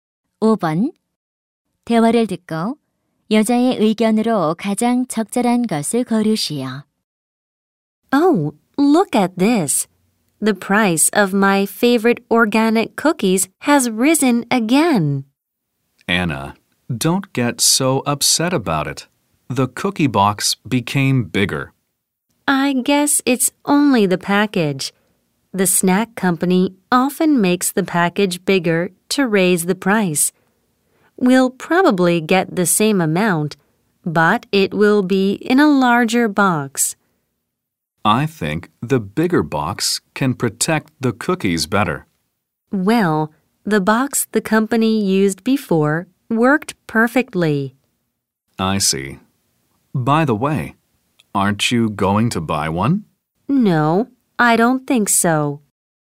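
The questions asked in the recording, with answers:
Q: 대화를 듣고 여자의 의견으로 가장 적절한 것을 고르시오.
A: 과자 회사가 가격을 올리려고 포장을 크게 만든다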